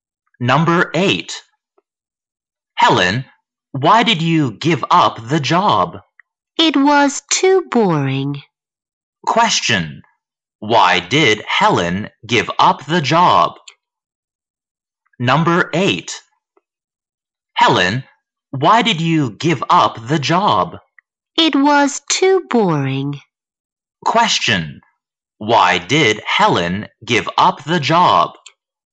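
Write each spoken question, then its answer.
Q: Why did Helen give up the job?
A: It was too boring.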